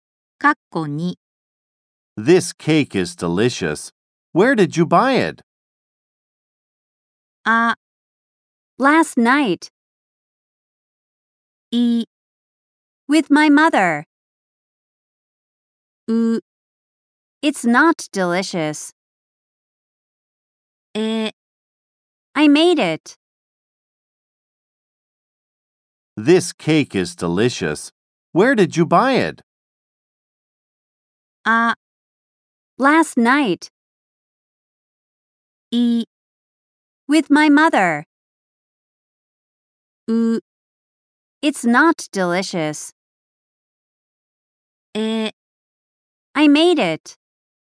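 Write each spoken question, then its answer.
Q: This cake is delicious. Where did you buy it?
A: え: I made it.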